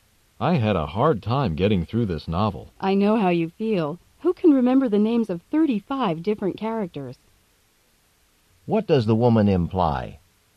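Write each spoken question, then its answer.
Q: What does the woman imply?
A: She also found the novel hard, because it has too many characters to remember.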